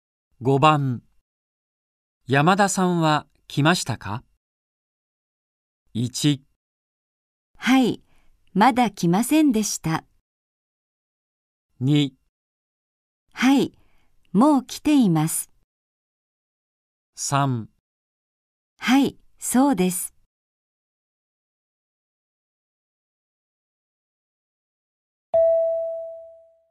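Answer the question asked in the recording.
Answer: 2: はい、もう来ています。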